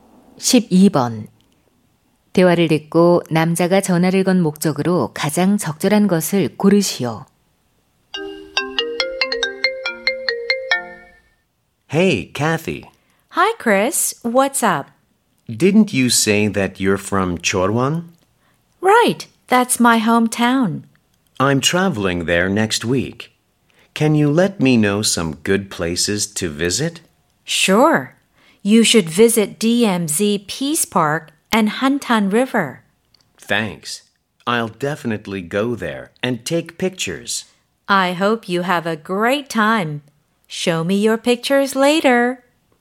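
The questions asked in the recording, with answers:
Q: 대화를 듣고 남자가 전화를 건 목적으로 가장 적절한 것을 고르시오.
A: 철원의 가볼 만한 곳 추천 부탁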